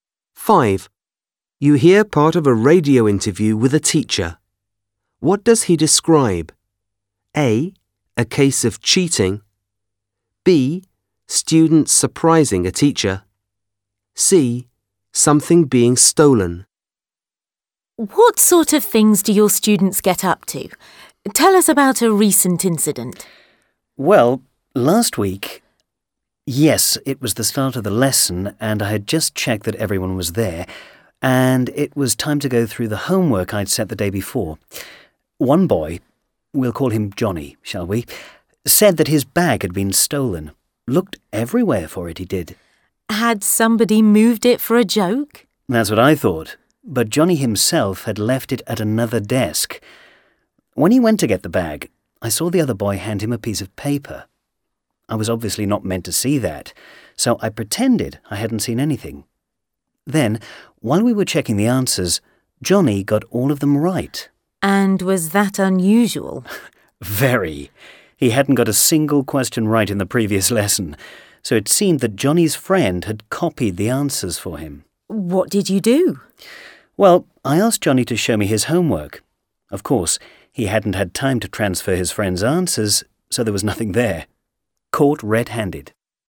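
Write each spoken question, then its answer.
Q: What does he describe?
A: A: A case of cheating.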